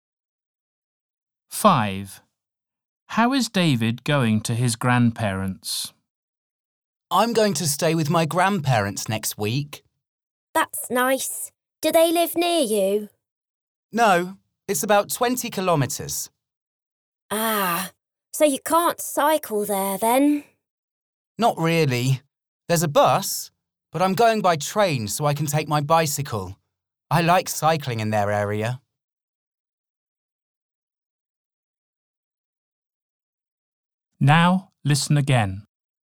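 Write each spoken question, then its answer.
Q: How is David going to his grandparents?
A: By train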